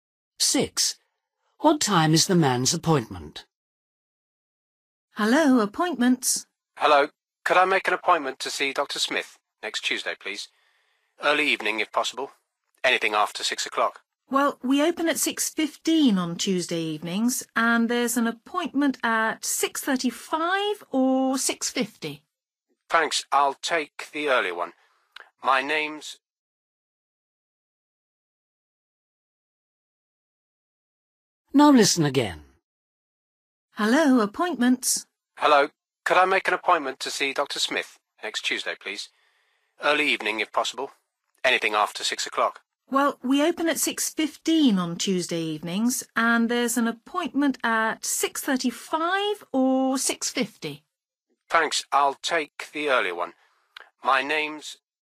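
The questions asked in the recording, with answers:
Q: What time is the man's appointment?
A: 6:35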